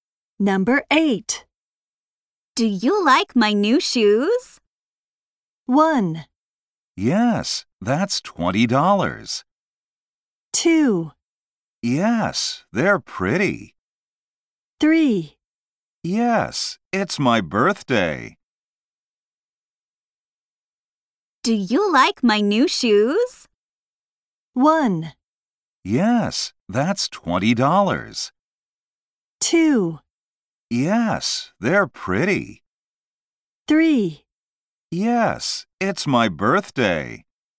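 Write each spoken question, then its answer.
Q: Do you like my new shoes?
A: 2: Yes, they're pretty.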